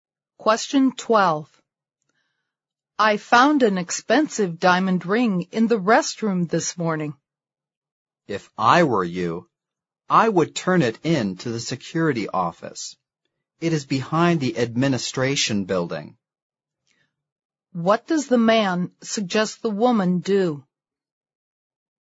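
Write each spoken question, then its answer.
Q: What does the man suggest the woman do?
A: Turn the ring in to the security office.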